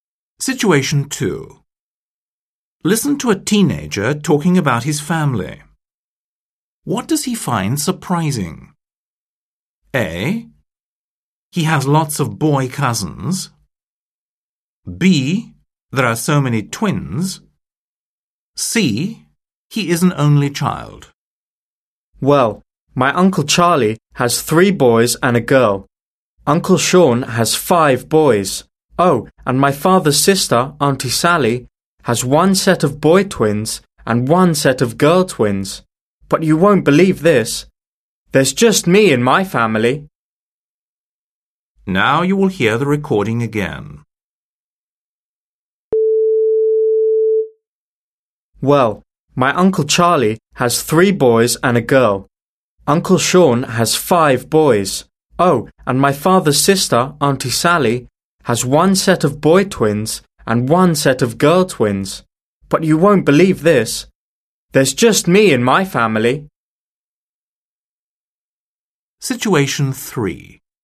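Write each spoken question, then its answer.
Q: What does he find surprising?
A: C: He is an only child.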